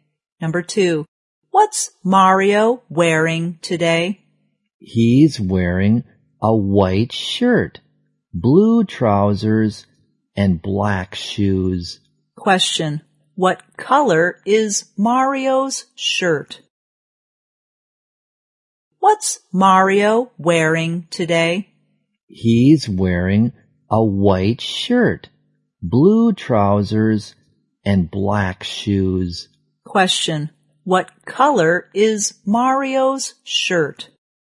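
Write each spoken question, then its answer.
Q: What color is Mario's shirt?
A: White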